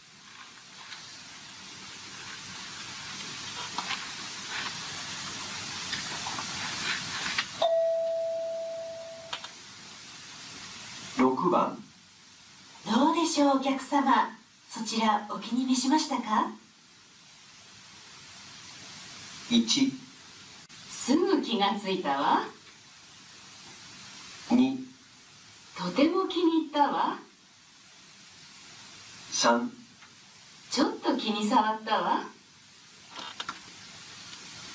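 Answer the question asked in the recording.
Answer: 2: とても気に入ったわ。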